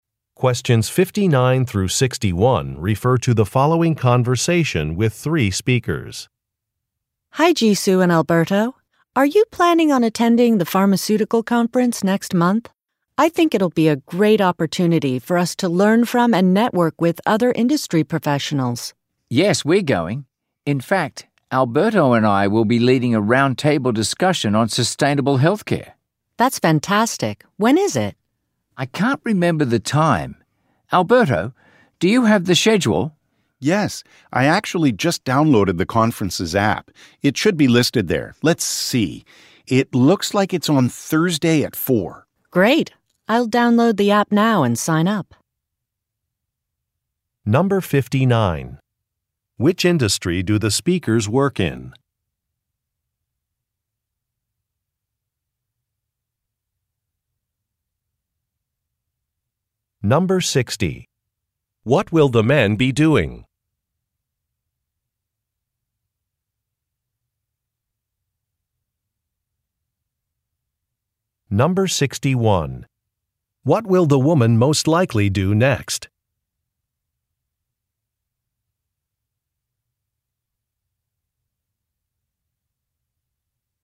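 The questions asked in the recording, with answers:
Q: Which industry do the speakers work in?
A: Pharmaceuticals

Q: What will the woman most likely do next?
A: Download the conference app and sign up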